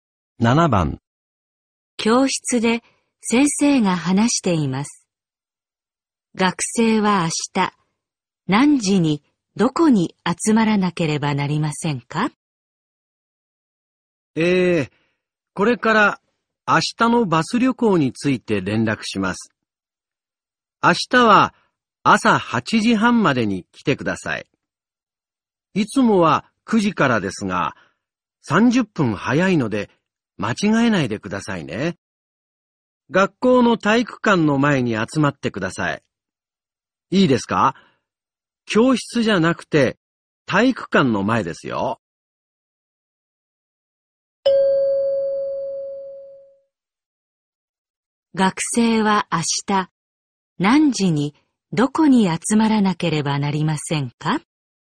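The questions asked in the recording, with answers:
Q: 学生は明日何時にどこに集まらなければなりませんか?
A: 8時半に体育館の前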